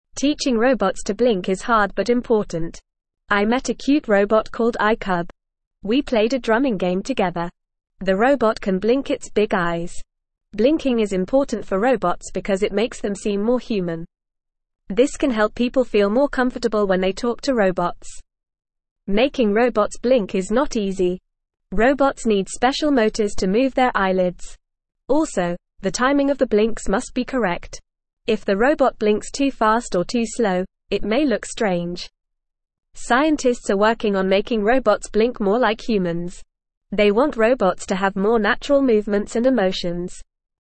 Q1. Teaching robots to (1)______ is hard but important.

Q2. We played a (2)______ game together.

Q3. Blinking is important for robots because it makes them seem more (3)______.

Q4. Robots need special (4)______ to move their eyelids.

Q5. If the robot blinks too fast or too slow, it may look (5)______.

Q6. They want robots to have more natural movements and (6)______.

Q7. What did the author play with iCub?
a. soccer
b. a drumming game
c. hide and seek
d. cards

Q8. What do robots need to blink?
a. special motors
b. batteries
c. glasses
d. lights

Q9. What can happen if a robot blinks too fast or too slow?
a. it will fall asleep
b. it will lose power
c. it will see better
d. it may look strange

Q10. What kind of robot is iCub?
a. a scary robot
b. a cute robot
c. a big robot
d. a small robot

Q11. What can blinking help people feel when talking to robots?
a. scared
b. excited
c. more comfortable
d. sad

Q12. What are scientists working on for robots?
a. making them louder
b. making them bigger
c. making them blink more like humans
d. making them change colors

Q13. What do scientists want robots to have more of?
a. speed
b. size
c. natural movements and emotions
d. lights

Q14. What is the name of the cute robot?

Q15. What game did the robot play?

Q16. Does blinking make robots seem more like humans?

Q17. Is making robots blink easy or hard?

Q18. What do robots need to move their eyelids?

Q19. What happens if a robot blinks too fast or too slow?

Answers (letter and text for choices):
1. blink
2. drumming
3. human
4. motors
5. strange
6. emotions
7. b. a drumming game
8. a. special motors
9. d. it may look strange
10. b. a cute robot
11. c. more comfortable
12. c. making them blink more like humans
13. c. natural movements and emotions
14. The name of the cute robot is iCub.
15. The robot played a drumming game.
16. Yes, blinking makes robots seem more like humans.
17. Making robots blink is hard.
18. Robots need special motors to move their eyelids.
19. If a robot blinks too fast or too slow, it may look strange.

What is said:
Teaching robots to blink is hard but important. I met a cute robot called iCub. We played a drumming game together. The robot can blink its big eyes. Blinking is important for robots because it makes them seem more human. This can help people feel more comfortable when they talk to robots.
Making robots blink is not easy. Robots need special motors to move their eyelids. Also, the timing of the blinks must be correct. If the robot blinks too fast or too slow, it may look strange. Scientists are working on making robots blink more like humans. They want robots to have more natural movements and emotions.

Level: Level 1